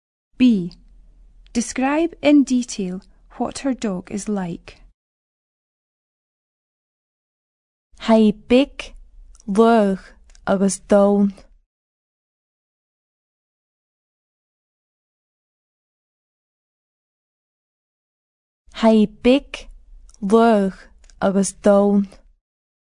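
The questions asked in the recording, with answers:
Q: B. Describe in detail what her dog is like.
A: Small, fast and brown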